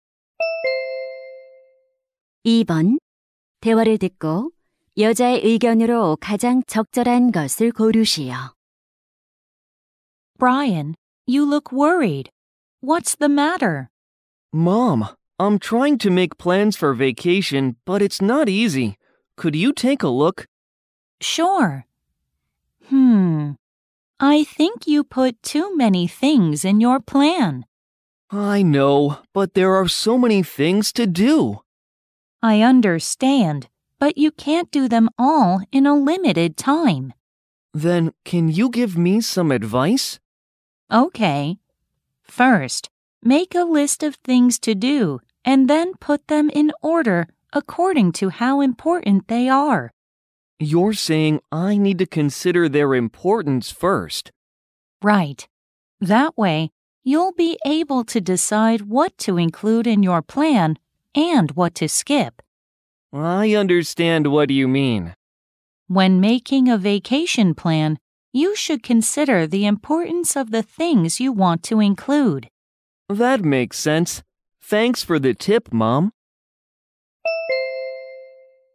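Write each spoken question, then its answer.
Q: 대화를 듣고 여자의 의견으로 가장 적절한 것을 고르시오.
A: 방학 계획을 세울 때 할 일의 중요도를 먼저 고려해야 한다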